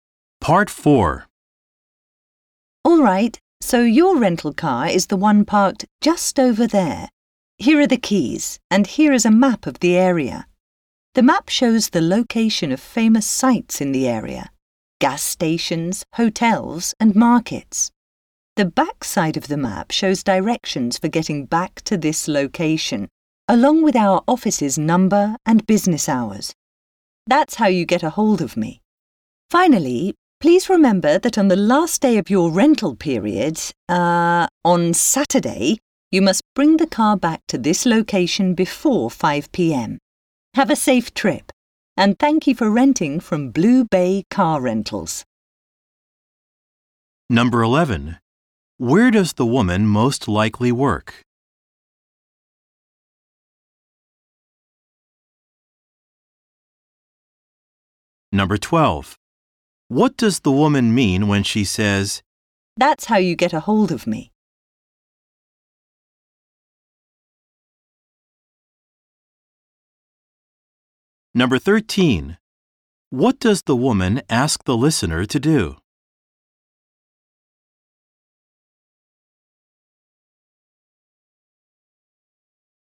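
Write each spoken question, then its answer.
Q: Where does the woman most likely work?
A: At a car rental company (Blue Bay Car Rentals)

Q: What does the woman mean when she says,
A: The listener can reach her with the office phone number on the map

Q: What does the woman ask the listener to do?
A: Return the car before 5 p.m. on Saturday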